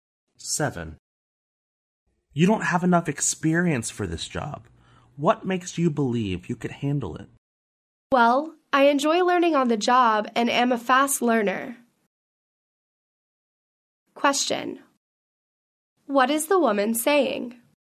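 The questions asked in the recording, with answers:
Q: What is the woman saying?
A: She can handle the job because she learns fast on the job.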